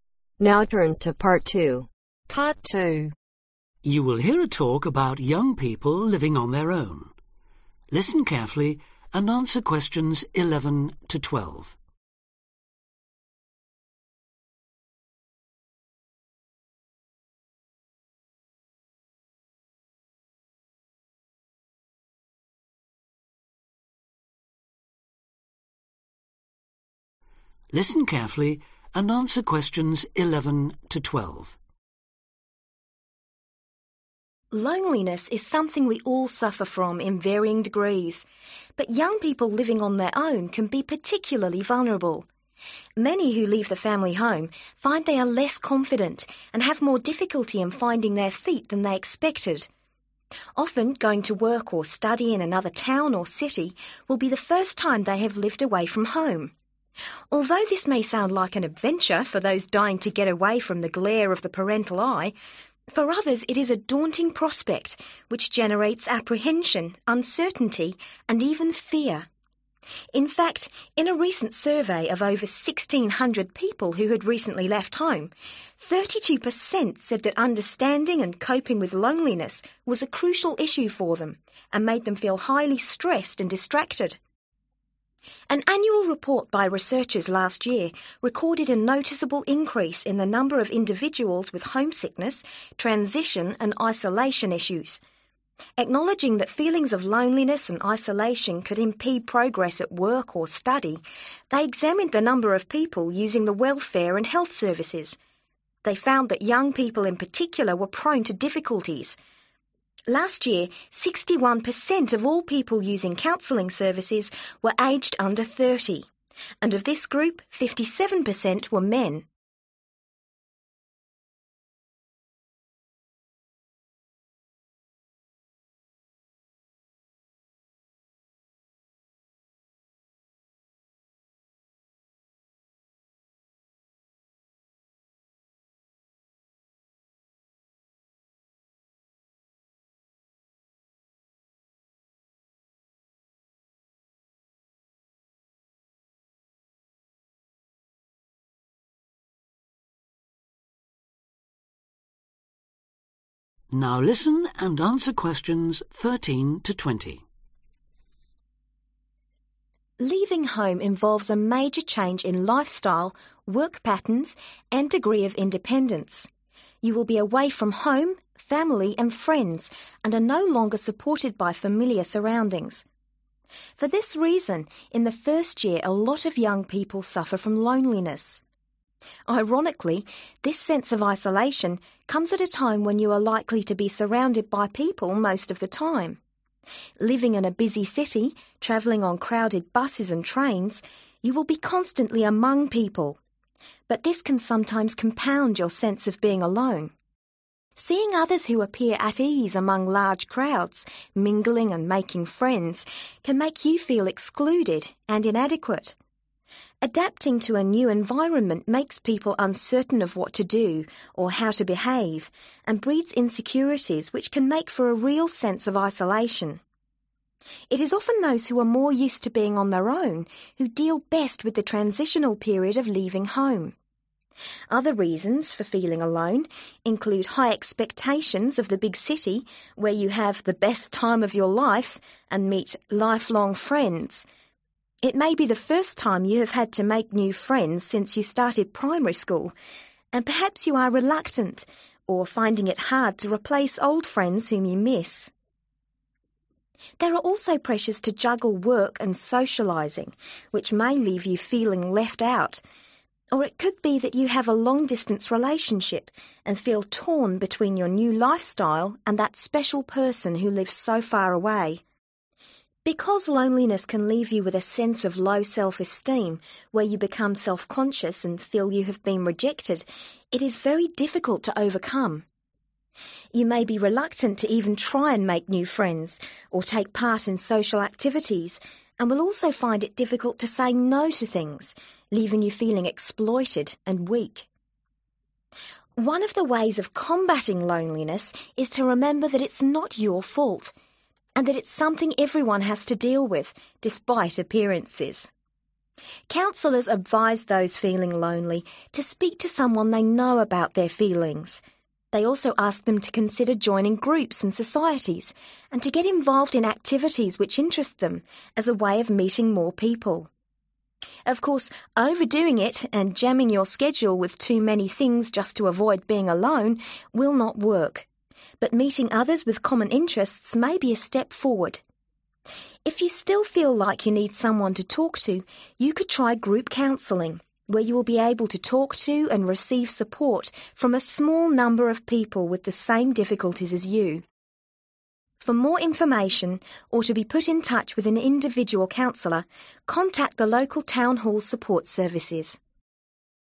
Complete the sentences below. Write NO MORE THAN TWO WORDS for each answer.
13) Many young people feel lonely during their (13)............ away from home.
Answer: First Year

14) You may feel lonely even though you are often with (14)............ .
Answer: (other) People

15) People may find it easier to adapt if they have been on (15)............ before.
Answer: Their Own

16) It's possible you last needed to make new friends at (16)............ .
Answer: Primary School

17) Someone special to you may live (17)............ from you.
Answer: Far (away)

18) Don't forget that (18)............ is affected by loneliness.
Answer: Everyone/Everybody

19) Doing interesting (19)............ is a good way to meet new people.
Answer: Activities

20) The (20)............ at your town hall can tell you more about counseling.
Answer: Support Services